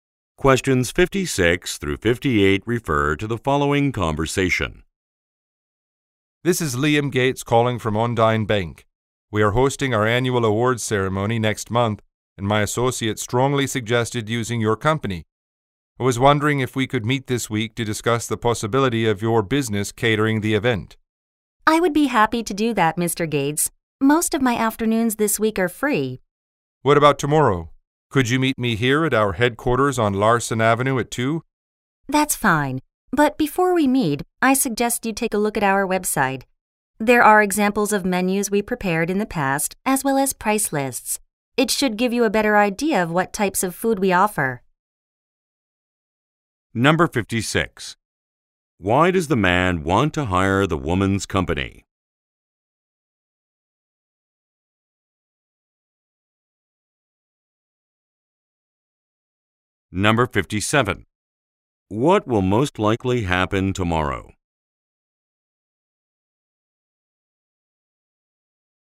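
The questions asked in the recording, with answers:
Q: Why does the man want to hire the woman's company?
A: His associate strongly recommended it.

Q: What will most likely happen tomorrow?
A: They will meet at the bank's headquarters at 2.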